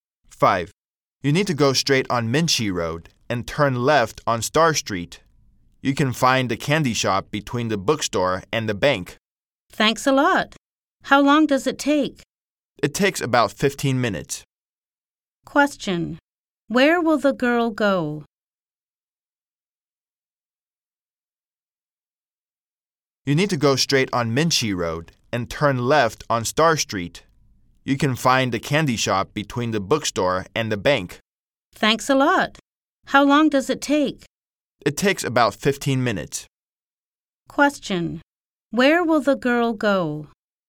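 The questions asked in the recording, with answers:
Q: Question. Where will the girl go?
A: The candy shop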